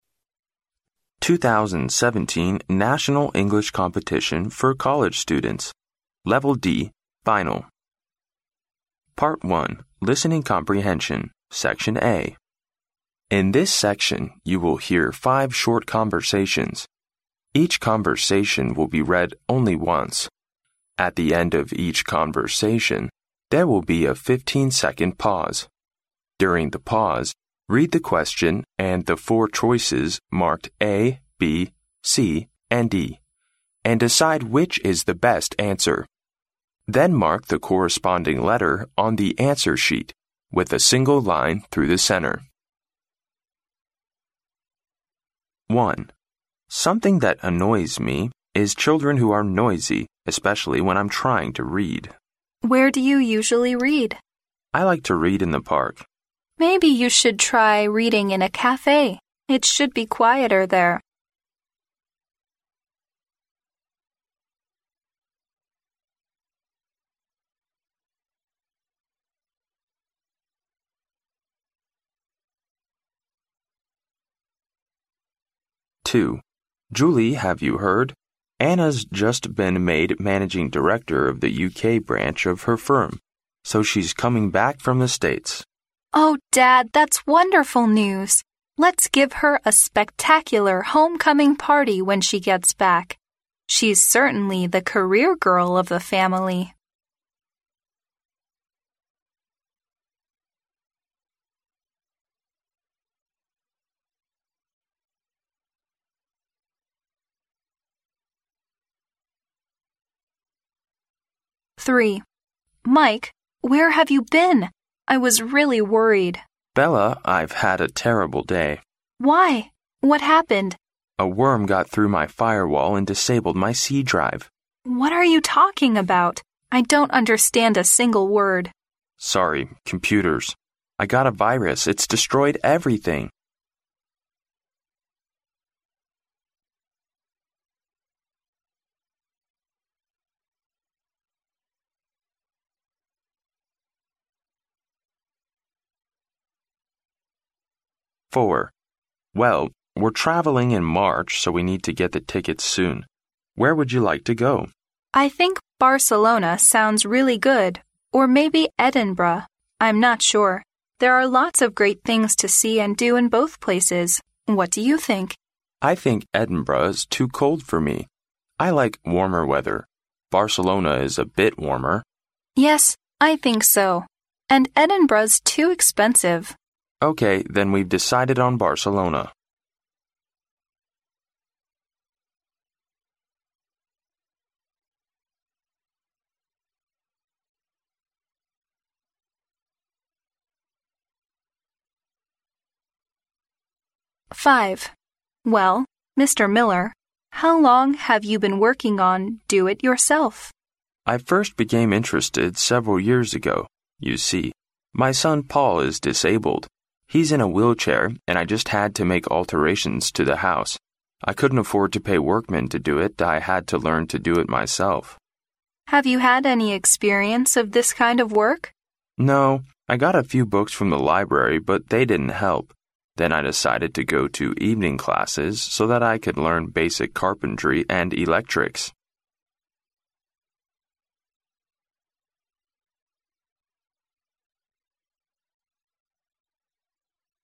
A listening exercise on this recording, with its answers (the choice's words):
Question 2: What is said about Anna?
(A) She will soon come back to work in the UK.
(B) Her family will hold a birthday party for her.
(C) She has been a manager of her firm for a few months.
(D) She has just been fired by the US branch of her firm.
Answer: She will soon come back to work in the UK.

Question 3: What's wrong with Mike's computer?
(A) It broke down all of a sudden.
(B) It has been infected by a virus.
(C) It crashed after it was reset.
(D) All the files in it were missing.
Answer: It has been infected by a virus.

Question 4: Why does the man prefer Barcelona to Edinburgh for their travel?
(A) The ticket of the flight to Barcelona is cheap.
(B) There aren't many great things to see in Edinburgh.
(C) It is warmer in Barcelona than in Edinburgh.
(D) The speakers have never been to Barcelona before.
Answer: It is warmer in Barcelona than in Edinburgh.

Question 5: How did Mr. Miller learn to do basic carpentry and electrics?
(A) He took evening classes.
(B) He learned it from Paul.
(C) His friends taught him.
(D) He read a lot of books.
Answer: He took evening classes.

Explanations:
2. 录音中男士说"Anna's just been made managing director of the UK branch of her firm"。由此可知Anna即将回英国工作。故选A。
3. 录音中Mike说有蠕虫病毒入侵了他的防火墙并毁了C盘,在Bella追问下才说"Sorry. Computers. I got a virus."。由此可知Mike的电脑被病毒感染。故选B。